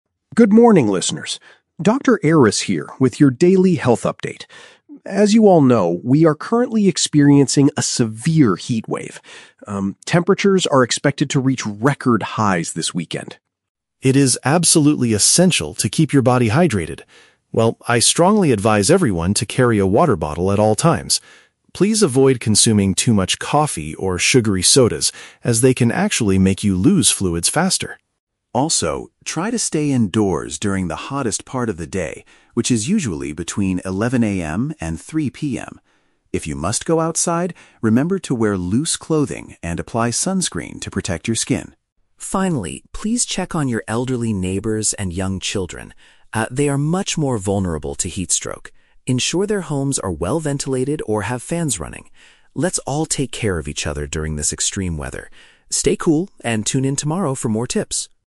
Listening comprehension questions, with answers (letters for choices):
Listen to a health expert giving advice on the radio and choose the correct answer (A, B, or C) for each question.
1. According to the doctor, what kind of drinks should listeners avoid right now?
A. Beverages containing large amounts of sugar.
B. Cold fruit juices with lots of ice.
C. Warm tap water from the kitchen.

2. When is the most dangerous time to be outside?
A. Early in the morning before sunrise.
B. Around the middle of the day.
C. Late in the evening after dinner.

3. What is one way to help older people and children during the heatwave?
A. Take them to the local public swimming pool.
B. Buy them new air conditioning units.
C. Make sure their living spaces have good air circulation.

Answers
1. A
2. B
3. C

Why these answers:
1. The doctor says to avoid "sugary sodas". "Beverages containing large amounts of sugar" is a paraphrase of sugary sodas.
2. The expert advises staying indoors during the hottest part of the day, "between 11 AM and 3 PM". "Around the middle of the day" is a paraphrase for this time frame.
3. Dr. Aris says to ensure the homes of the elderly and children are "well-ventilated or have fans running". "Good air circulation" is a direct synonym for well-ventilated and using fans.

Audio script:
Dr. Aris: Good morning, listeners. Dr. Aris here with your daily health update. As you all know, we are currently experiencing a severe heatwave. Um, temperatures are expected to reach record highs this weekend.
It is absolutely essential to keep your body hydrated. Well, I strongly advise everyone to carry a water bottle at all times. Please avoid consuming too much coffee or sugary sodas, as they can actually make you lose fluids faster.
Also, try to stay indoors during the hottest part of the day, which is usually between 11 AM and 3 PM. If you must go outside, remember to wear loose clothing and apply sunscreen to protect your skin.
Finally, please check on your elderly neighbors and young children. Ah, they are much more vulnerable to heatstroke. Ensure their homes are well-ventilated or have fans running. Let's all take care of each other during this extreme weather. Stay cool, and tune in tomorrow for more tips.